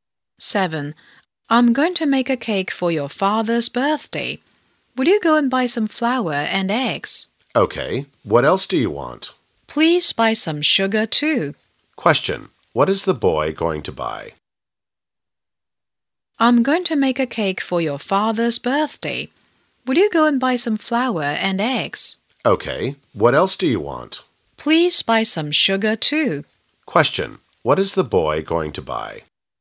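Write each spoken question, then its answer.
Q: What is the boy going to buy?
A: Flour, eggs and sugar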